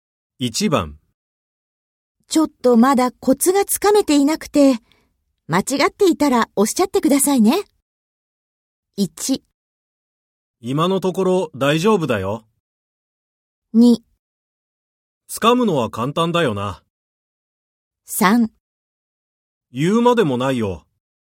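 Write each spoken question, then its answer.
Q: ちょっとまだコツがつかめていなくて、間違っていたらおっしゃってくださいね。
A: 1: 今のところ大丈夫だよ。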